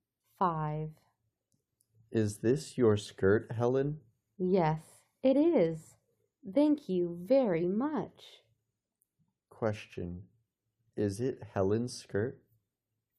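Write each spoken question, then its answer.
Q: Is it Helen's skirt?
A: Yes, it is.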